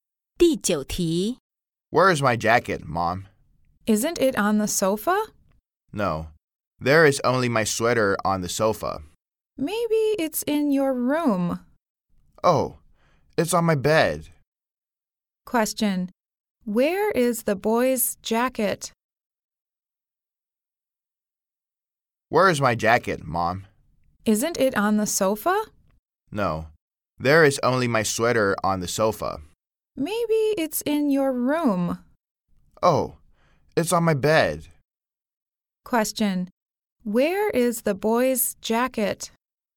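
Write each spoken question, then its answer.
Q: Where is the boy's jacket?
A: On his bed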